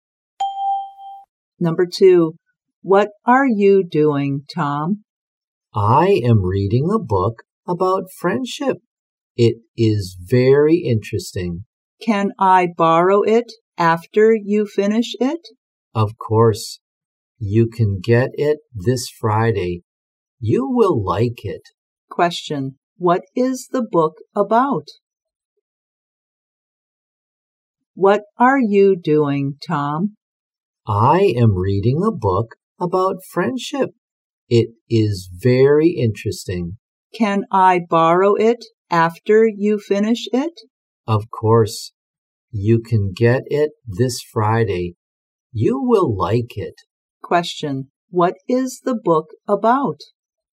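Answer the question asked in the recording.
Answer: Friendship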